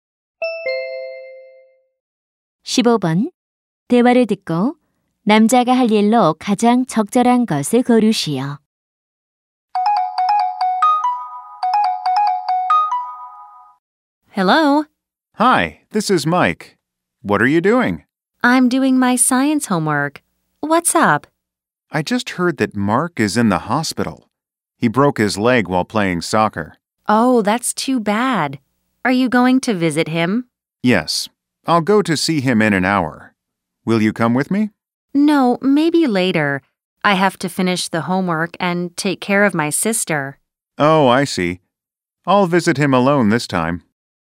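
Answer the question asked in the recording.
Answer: 병원에 입원한 Mark를 혼자 병문안 가기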